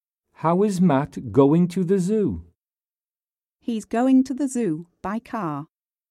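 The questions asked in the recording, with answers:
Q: How is Matt going to the zoo?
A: By car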